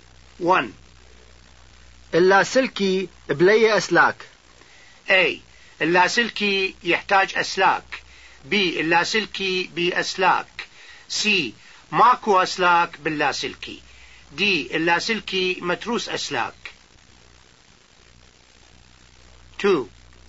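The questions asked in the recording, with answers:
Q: اللاسلكي بلاي أسلاك.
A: C: ماكو أسلاك باللاسلكي.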